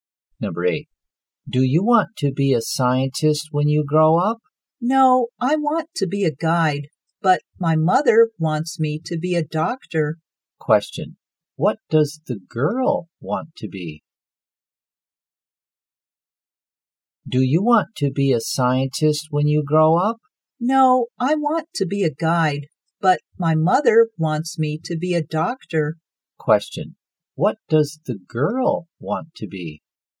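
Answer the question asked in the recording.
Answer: A guide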